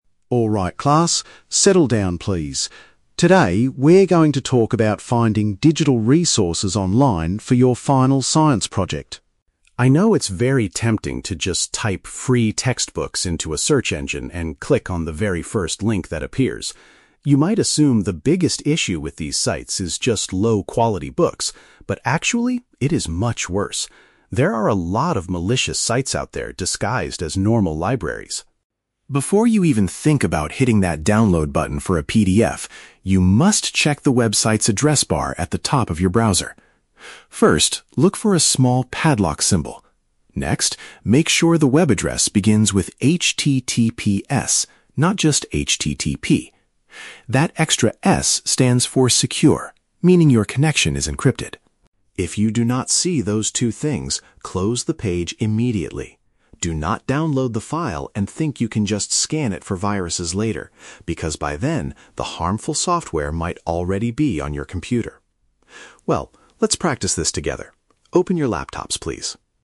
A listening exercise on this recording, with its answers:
Listen to the IT teacher giving instructions to the class, and choose the correct answer (A, B, or C) for each question.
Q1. According to the teacher, what is the real danger of searching for free textbooks online?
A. The information inside the books is usually of very low quality.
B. Some of the websites are actually dangerous fakes.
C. Students might accidentally break the school's copyright rules.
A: B. Some of the websites are actually dangerous fakes.

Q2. How can students confirm that a website is safe to use?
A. By checking that the web address is simply HTTP.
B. By asking the school librarian to verify the website link.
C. By looking for a specific letter and a security icon at the top.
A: C. By looking for a specific letter and a security icon at the top.

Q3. What should a student do if a website lacks these security features?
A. Leave the webpage right away without clicking anything.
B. Download the document but use an antivirus scanner afterward.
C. Call the teacher over to inspect the computer screen.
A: A. Leave the webpage right away without clicking anything.

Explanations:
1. The teacher states that there are "a lot of malicious sites out there disguised as normal libraries." Option B paraphrases this as "dangerous fakes." Why the traps are wrong: Option A is a trap; the teacher mentions "low-quality books" but explicitly says that is not the biggest issue. Option C is a plausible concern for schools, but copyright is never mentioned in the audio.
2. The teacher tells the students to look for a "padlock symbol" (security icon) and the letter 'S' in HTTPS. Option C summarizes these instructions. Why the traps are wrong: Option A is a trap because the teacher explicitly warns them not to use a site if it is "just HTTP." Option B is a logical guess, but the librarian is not mentioned in this speech.
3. The teacher instructs the students to "close the page immediately." Option A uses the synonym phrase "Leave the webpage right away." Why the traps are wrong: Option B is a trap; the teacher mentions scanning for viruses later, but strongly rejects this idea ("Do not download the file and think you can just scan it..."). Option C is a plausible classroom action, but the teacher never tells them to ask for help in this situation.

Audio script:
IT Teacher: Alright class, settle down please. Today we are going to talk about finding digital resources online for your final science project.
I know it's very tempting to just type "free textbooks" into a search engine and click on the very first link that appears. You might assume the biggest issue with these sites is just low-quality books. But actually, it is much worse. There are a lot of malicious sites out there disguised as normal libraries.
Before you even think about hitting that download button for a PDF, you must check the website's address bar at the top of your browser. First, look for a small padlock symbol. That extra 'S' stands for 'secure', meaning your connection is encrypted.
If you do not see those two things, close the page immediately. Do not download the file and think you can just scan it for viruses later, because by then, the harmful software might already be on your computer. Well, let's practice this together. Open your laptops, please.

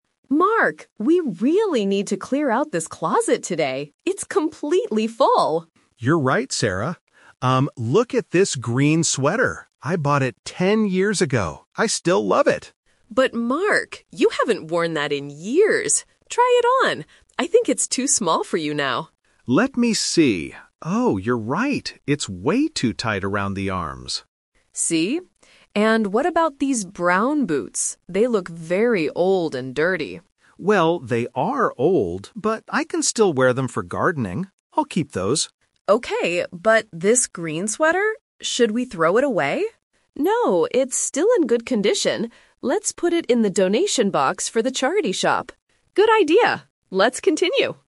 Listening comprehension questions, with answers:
Listen to the conversation between a husband and wife and choose the correct answer (A, B, or C).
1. What is the main problem with the green sweater?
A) It is the wrong color.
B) It is too tight for Mark.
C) It is dirty and broken.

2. What does Mark decide to do with the brown boots?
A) He will keep them for gardening.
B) He will put them in the donation box.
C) He will give them to his friend.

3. What will happen to the green sweater at the end?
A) Mark will wear it today.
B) Sarah will throw it in the trash.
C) They will donate it to charity.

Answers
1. B) It is too tight for Mark.
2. A) He will keep them for gardening.
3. C) They will donate it to charity.

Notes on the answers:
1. Mark tries the sweater on and says, "It's way too tight around the arms." Option (A) is not mentioned. Option (C) is a trap because Sarah says the boots are dirty, not the sweater.
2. This is a "Twist." Sarah suggests they are old, but Mark rejects the idea of getting rid of them, saying "I'll keep those" to use for gardening.
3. Although the sweater is too small, Mark says "Let's put it in the donation box." Option (B) is the trap because Sarah asks if they should "throw it away," but Mark says "No."

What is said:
Sarah: Mark, we really need to clear out this closet today. It's completely full!
Mark: You're right, Sarah. Um, look at this green sweater. I bought it ten years ago. I still love it.
Sarah: But Mark, you haven't worn that in years. Try it on. I think it's too small for you now.
Mark: Let me see... Oh, you're right. It's way too tight around the arms.
Sarah: See? And what about these brown boots? They look very old and dirty.
Mark: Well, they are old, but I can still wear them for gardening. I'll keep those.
Sarah: Okay. But this green sweater... should we throw it away?
Mark: No, it's still in good condition. Let's put it in the donation box for the charity shop.
Sarah: Good idea. Let's continue!

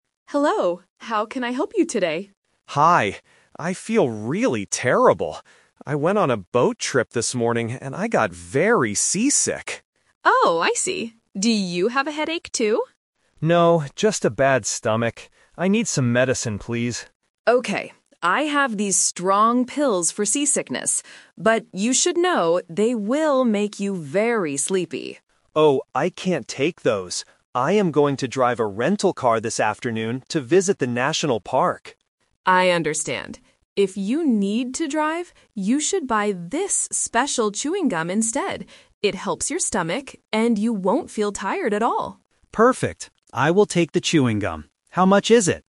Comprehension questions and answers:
Listen to a conversation between a tourist and a pharmacist. Choose the correct answer (A, B, or C) for each question.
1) Why does the tourist feel terrible?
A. Because he has a bad headache.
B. Because he went on a boat trip.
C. Because he drove a car too fast.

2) Why doesn't the tourist want the strong pills?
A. Because they are too expensive.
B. Because he needs to stay awake to drive.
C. Because he doesn't like swallowing pills.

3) What does the tourist finally buy?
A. Some strong pills.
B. A bottle of water.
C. Some special chewing gum.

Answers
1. B. Because he went on a boat trip.
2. B. Because he needs to stay awake to drive.
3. C. Some special chewing gum.

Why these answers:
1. The tourist says, "I went on a boat trip this morning and I got very seasick." Option (A) is a trap; the pharmacist asks about a headache, but the tourist says "No". Option (C) is a trap using the word "drive" from his future plans.
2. The pharmacist says the pills will make him "very sleepy". The tourist refuses because "I am going to drive a rental car this afternoon." Therefore, he needs to stay awake. Options (A) and (C) are not mentioned in the audio.
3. This is The Twist. The pharmacist first offers "strong pills", but the tourist cannot take them. Then, the pharmacist suggests "special chewing gum", and the tourist agrees ("I will take the chewing gum"). Option (A) is the trap (the rejected medicine). Option (B) is not mentioned.

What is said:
Pharmacist: Hello. How can I help you today?
Tourist: Hi. I feel really terrible. I went on a boat trip this morning and I got very seasick.
Pharmacist: Oh, I see. Do you have a headache, too?
Tourist: No, just a bad stomach. I need some medicine, please.
Pharmacist: Okay. I have these strong pills for seasickness. But you should know, they will make you very sleepy.
Tourist: Oh, I can't take those. I am going to drive a rental car this afternoon to visit the national park.
Pharmacist: I understand. If you need to drive, you should buy this special chewing gum instead. It helps your stomach, and you won't feel tired at all.

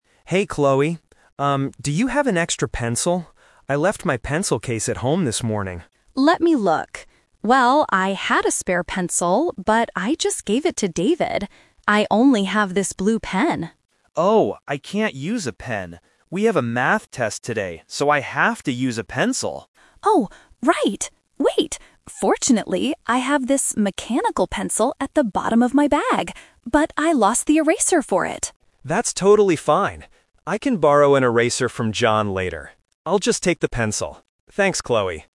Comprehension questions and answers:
Listen to the conversation between two desk-mates and choose the best answer (A, B, or C) for each question below.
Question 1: What did Mike leave at home?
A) His Math test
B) His pencil case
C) His blue pen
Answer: B) His pencil case

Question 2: What does Chloe offer to lend Mike at first?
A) An eraser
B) A spare pencil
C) A blue pen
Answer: C) A blue pen

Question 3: What does Mike finally borrow from Chloe?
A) A pencil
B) A blue pen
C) An eraser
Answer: A) A pencil

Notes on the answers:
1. Mike clearly says at the beginning, "I left my pencil case at home this morning." Why the traps are wrong: Option (A) is the "Plausible Trap". They have a Math test today, but he didn't leave it at home. Option (C) mentions "blue pen," which is what Chloe has, not what Mike left at home.
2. Chloe checks her bag and says, "I only have this blue pen." Why the traps are wrong: Option (B) is "The Trap". Chloe had a spare pencil, but she already gave it to David, so she cannot offer it to Mike. Option (A) is mentioned later in the audio but not offered by Chloe.
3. At the end, Chloe finds a mechanical pencil, and Mike says, "I'll just take the pencil." Why the traps are wrong: Option (B) is "The Twist Trap". Chloe offers the blue pen first, but Mike rejects it because he has a Math test. Option (C) is also a trap; Chloe lost her eraser, so Mike decides to borrow an eraser from someone else (John), not from Chloe.

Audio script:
Mike: Hey Chloe. Um, do you have an extra pencil? I left my pencil case at home this morning.
Chloe: Let me look. Well, I had a spare pencil, but I just gave it to David. I only have this blue pen.
Mike: Oh, I can't use a pen. We have a Math test today, so I have to use a pencil.
Chloe: Oh, right. Wait! Fortunately, I have this mechanical pencil at the bottom of my bag. But I lost the eraser for it.
Mike: That's totally fine! I can borrow an eraser from John later. I'll just take the pencil. Thanks, Chloe!

